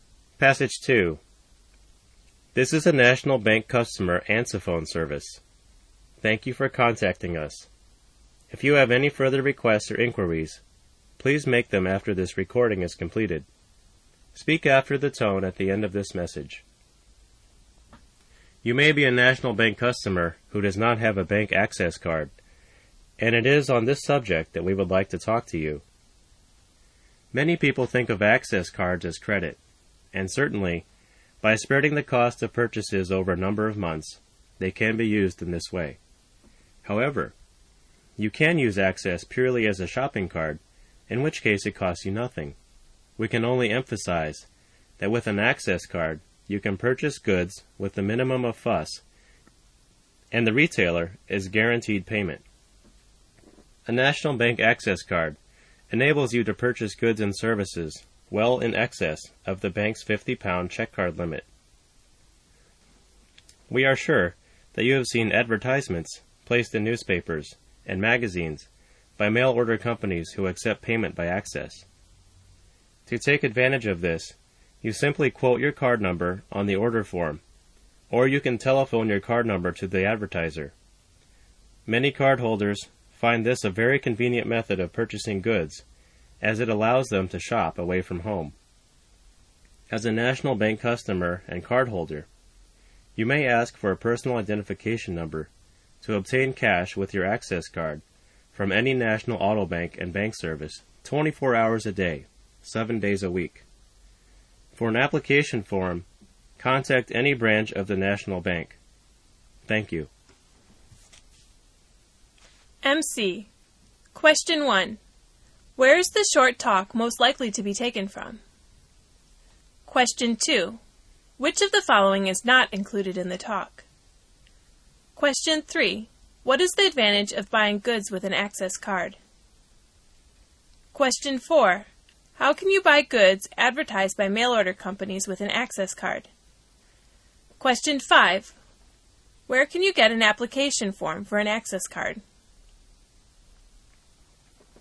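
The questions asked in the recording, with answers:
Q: Where is the short talk most likely to be taken from?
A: A National Bank customer answerphone message

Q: How can you buy goods advertised by mail order companies with an access card?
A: Quote the card number on the order form or telephone it to the advertiser

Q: Where can you get an application form for an access card?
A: At any branch of the National Bank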